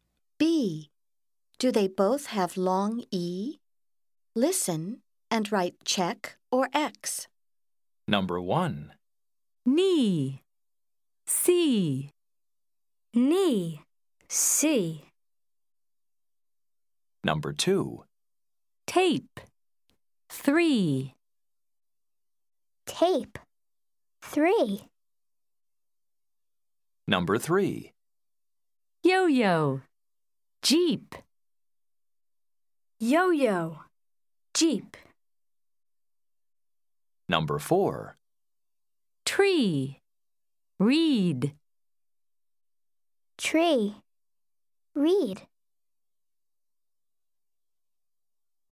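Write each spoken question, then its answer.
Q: Do they both have long E?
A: Yes (knee, see)

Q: Do they both have long E?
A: No (yo-yo, jeep)

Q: Do they both have long E?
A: Yes (tree, read)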